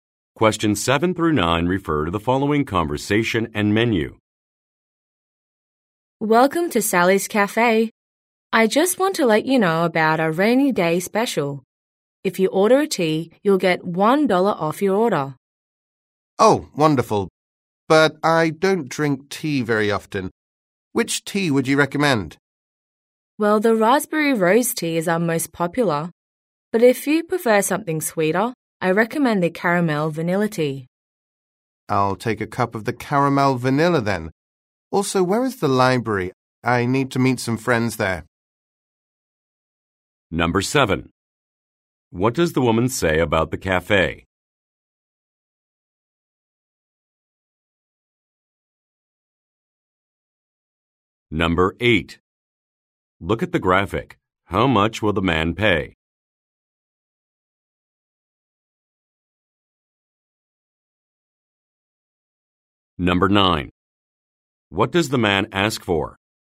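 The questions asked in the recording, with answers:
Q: What does the woman say about the cafe?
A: It has a rainy day special: $1 off with a tea order

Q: What does the man ask for?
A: Directions to the library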